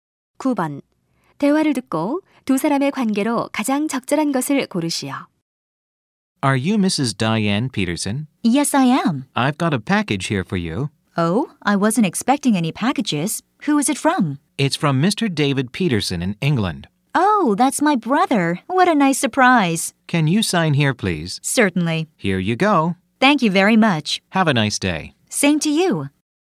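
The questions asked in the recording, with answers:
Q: 대화를 듣고 두 사람의 관계로 가장 적절한 것을 고르시오.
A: 택배 기사 - 수령인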